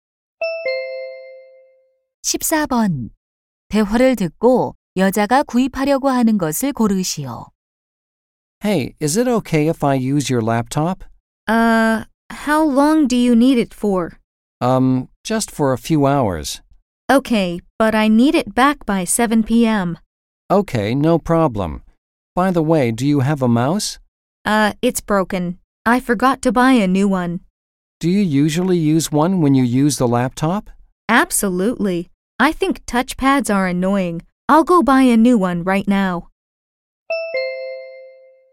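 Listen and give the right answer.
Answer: 마우스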